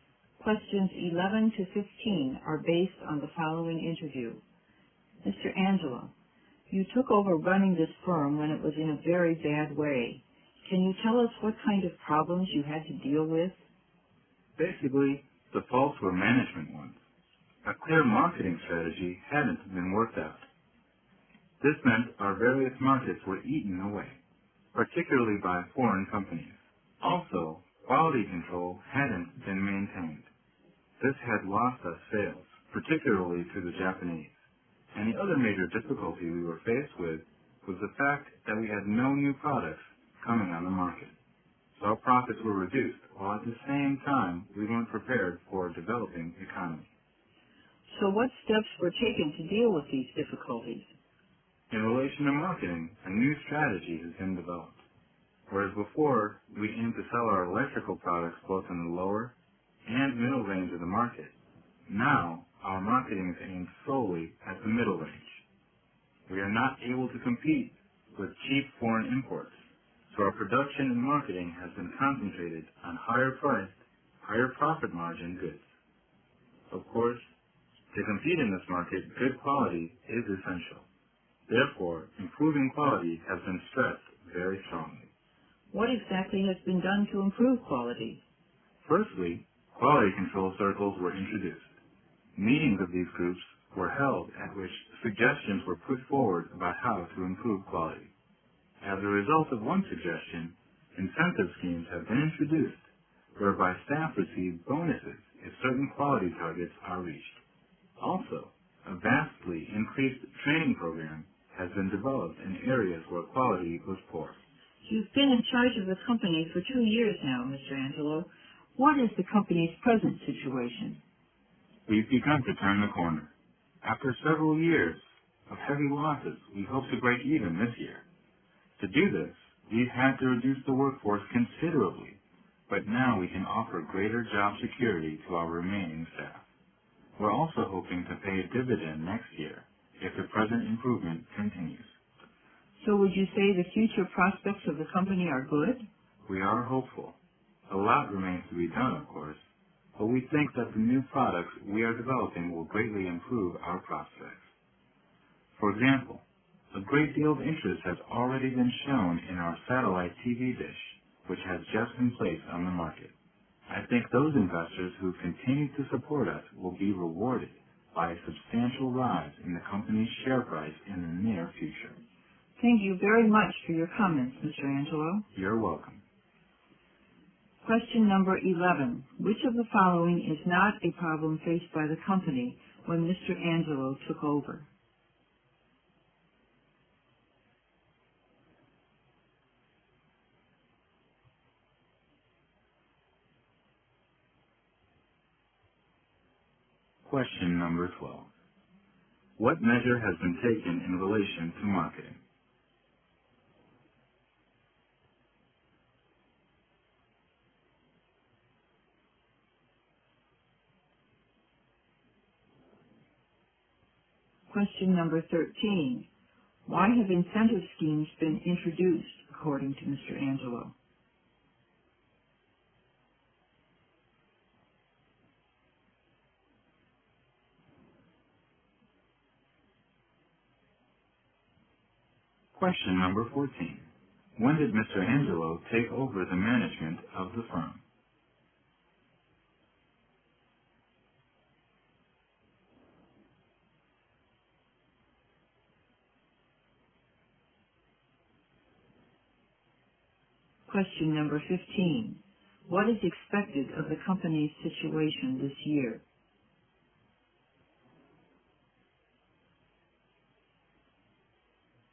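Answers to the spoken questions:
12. Marketing is now aimed only at the middle range of the market
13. To improve quality (staff get bonuses for reaching quality targets)
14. Two years ago
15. It hopes to break even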